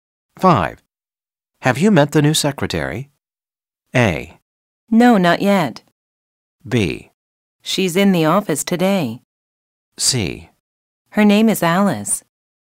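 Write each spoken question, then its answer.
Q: Have you met the new secretary?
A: A: No, not yet.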